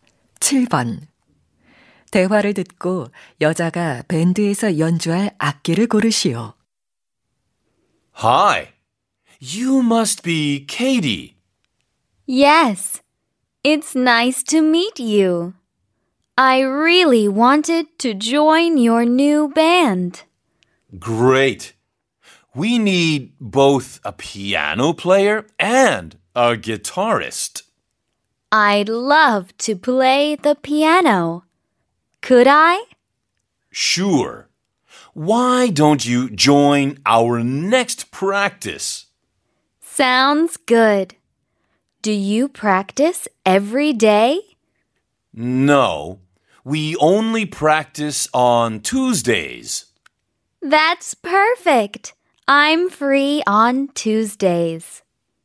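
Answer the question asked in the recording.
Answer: 피아노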